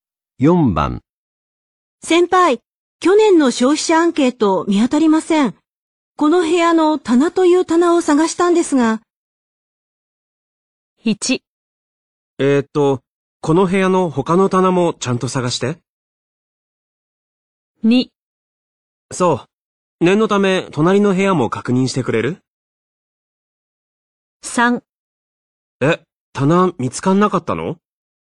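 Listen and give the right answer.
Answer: 2: そう。念のため、隣の部屋も確認してくれる?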